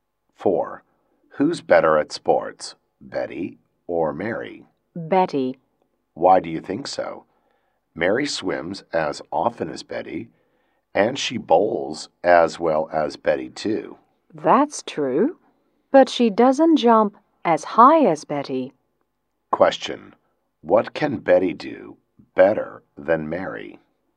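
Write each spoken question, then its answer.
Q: What can Betty do better than Mary?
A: Jump (higher)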